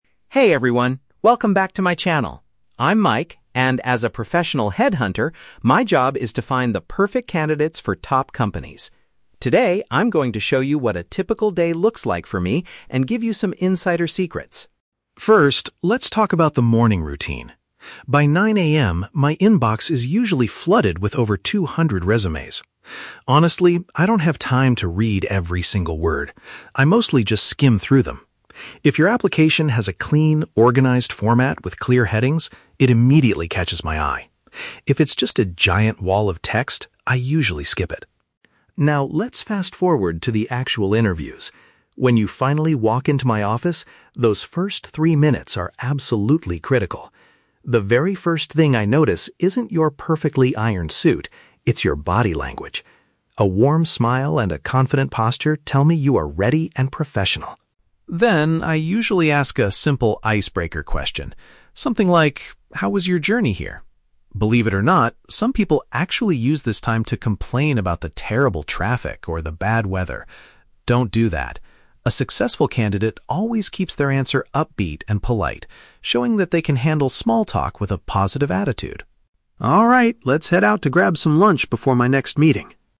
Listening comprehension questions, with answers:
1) What makes a resume stand out to Mike during his morning review?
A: A well-structured and tidy visual layout.

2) According to Mike, what is the most important factor when a candidate first enters the room?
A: The physical gestures and facial expressions of the applicant.

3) How should candidates respond to Mike's casual opening question?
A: By maintaining a cheerful and respectful tone.

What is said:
Vlogger (Mike): Hey everyone, welcome back to my channel! I'm Mike, and as a professional headhunter, my job is to find the perfect candidates for top companies. Today, I'm going to show you what a typical day looks like for me, and give you some insider secrets.
First, let's talk about the morning routine. By 9:00 AM, my inbox is usually flooded with over two hundred resumes. Honestly, I don't have time to read every single word. I mostly just skim through them. If your application has a clean, organized format with clear headings, it immediately catches my eye. If it's just a giant wall of text, I usually skip it.
Now, let's fast forward to the actual interviews. When you finally walk into my office, those first three minutes are absolutely critical. The very first thing I notice isn't your perfectly ironed suit. It's your body language. A warm smile and a confident posture tell me you are ready and professional.
Then, I usually ask a simple icebreaker question, something like, "How was your journey here?". Believe it or not, some people actually use this time to complain about the terrible traffic or the bad weather. Don't do that! A successful candidate always keeps their answer upbeat and polite, showing that they can handle small talk with a positive attitude.
Alright, let's head out to grab some lunch before my next meeting...